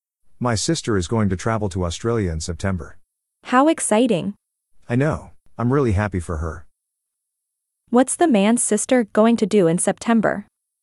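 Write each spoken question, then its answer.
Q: What's the man's sister going to do in September?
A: travel to Australia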